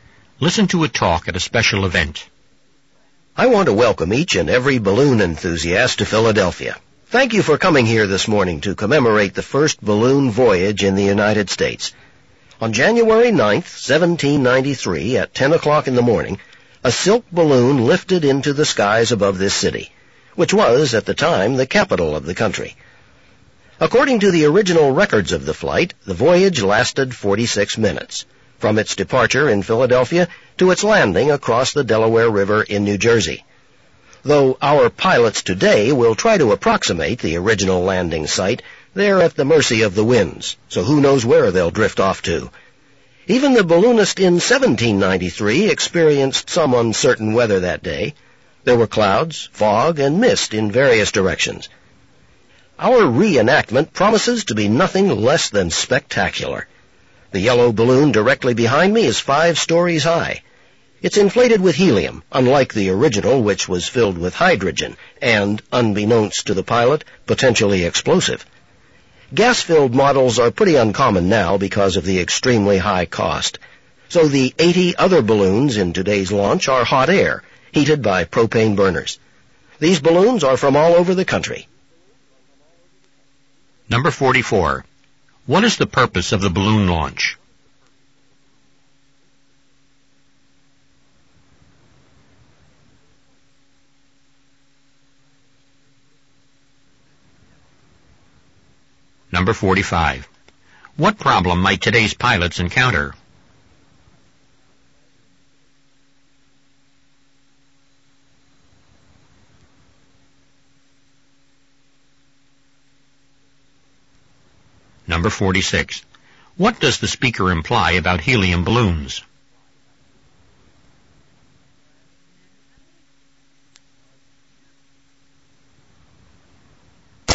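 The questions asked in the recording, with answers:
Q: What is the purpose of the balloon launch?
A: To commemorate the first balloon voyage in the United States

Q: What problem might today's pilots encounter?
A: The winds may carry them away from the original landing site

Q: What does the speaker imply about helium balloons?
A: They are uncommon because they are very expensive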